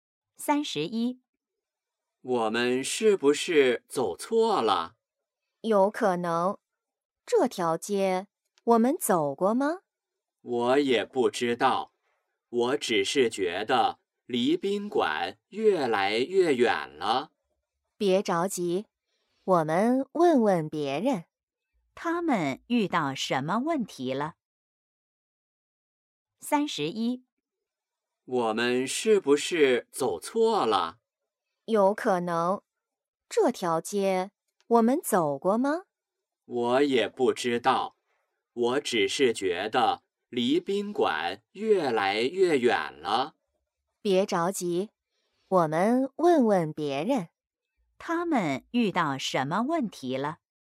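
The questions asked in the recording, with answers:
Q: 他们遇到什么问题了。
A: 走错路了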